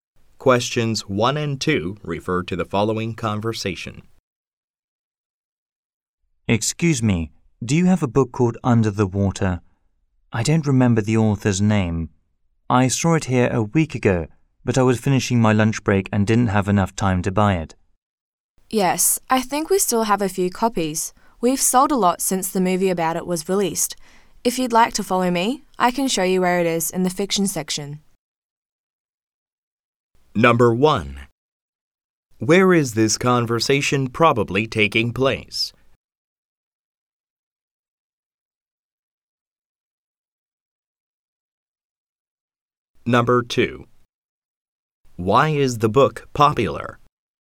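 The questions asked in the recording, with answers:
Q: Where is this conversation probably taking place?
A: In a bookstore

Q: Why is the book popular?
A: A movie about it was released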